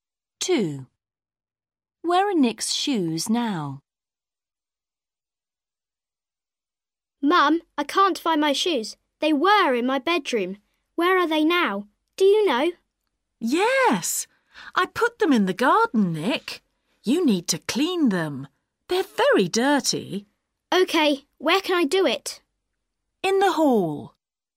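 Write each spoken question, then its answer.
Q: Where are Nick's shoes now?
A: in the garden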